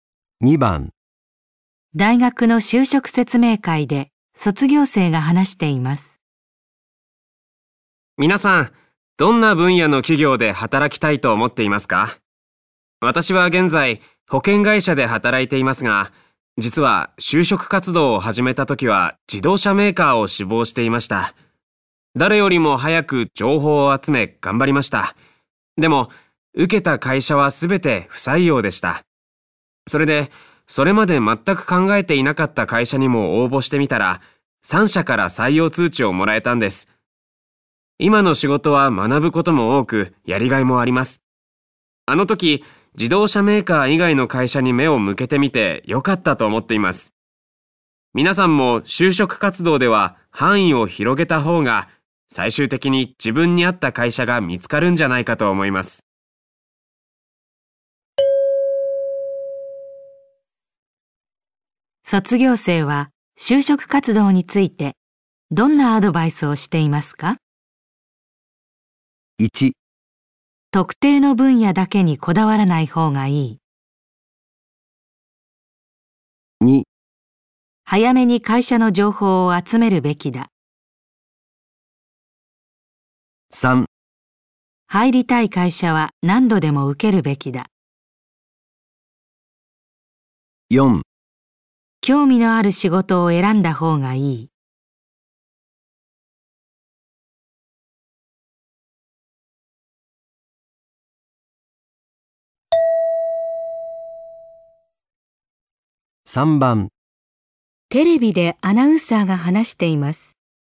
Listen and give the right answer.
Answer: 1

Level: N2 Listening · Test 3